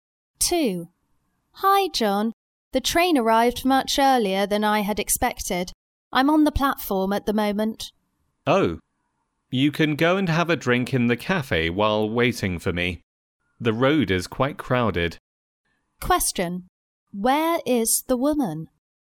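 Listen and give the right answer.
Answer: At the train station (on the platform)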